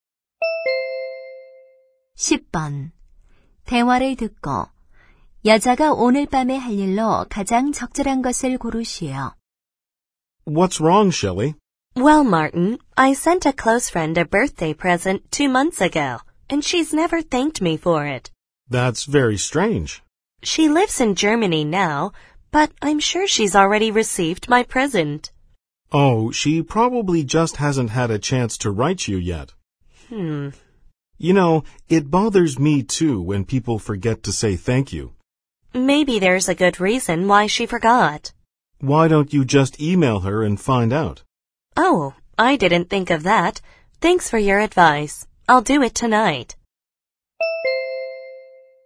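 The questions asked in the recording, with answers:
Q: 대화를 듣고 여자가 오늘 밤에 할 일로 가장 적절한 것을 고르시오.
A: 독일에 사는 친구에게 이메일 보내기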